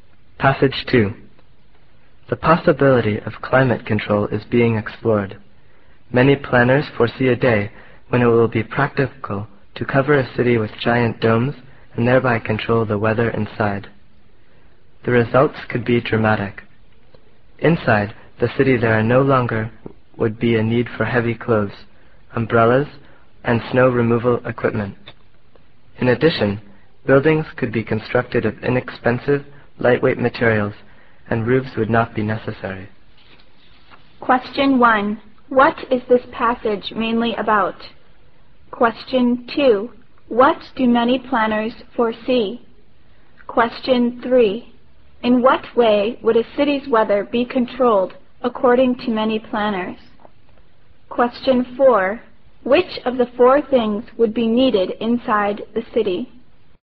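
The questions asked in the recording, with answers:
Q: What is this passage mainly about?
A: The possibility of climate control

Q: What do many planners foresee?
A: Covering cities with giant domes to control the weather inside

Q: In what way would a city's weather be controlled according to many planners?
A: By covering the city with giant domes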